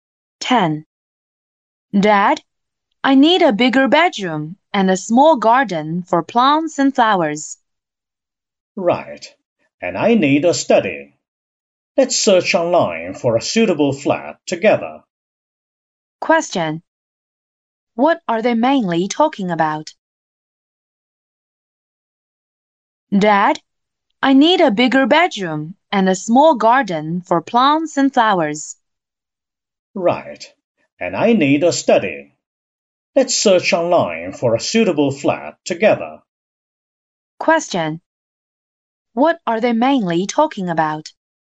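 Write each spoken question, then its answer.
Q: What are they mainly talking about?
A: Finding a suitable new flat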